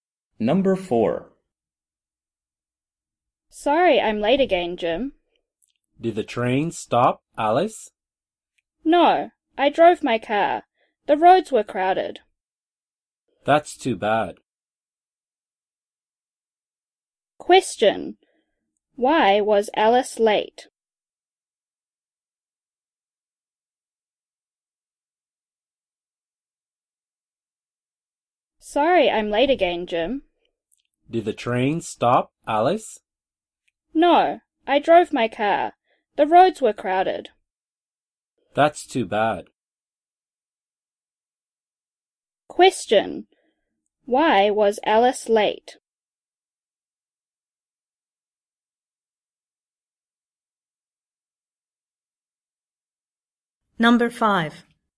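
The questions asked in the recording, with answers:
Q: Why was Alice late?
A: The roads were crowded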